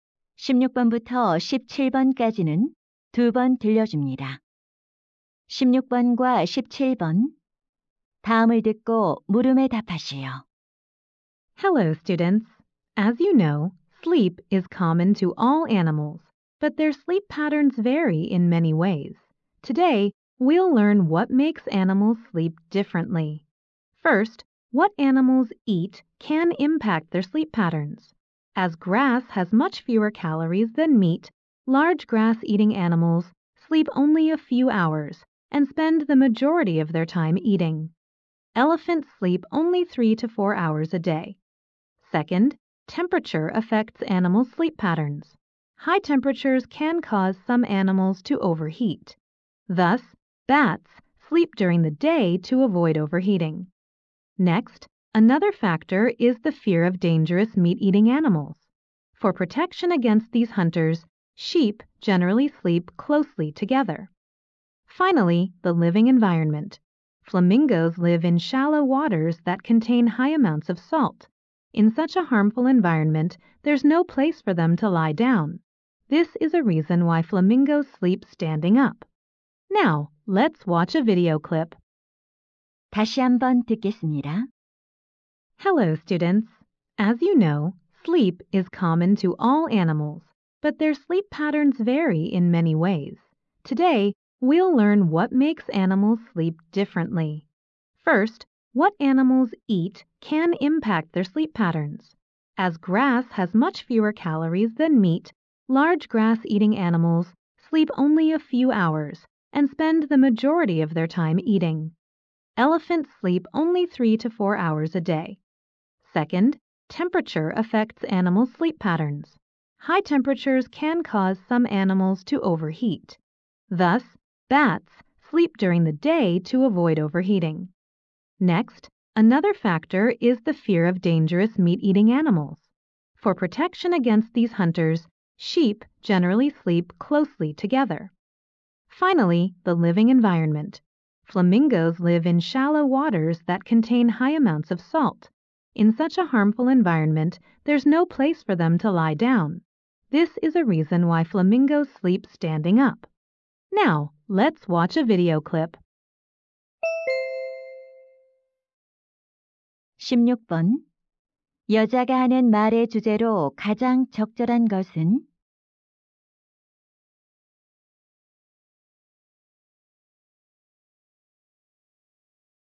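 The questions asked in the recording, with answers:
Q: 여자가 하는 말의 주제로 가장 적절한 것은?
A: 동물의 수면 패턴에 영향을 주는 요인들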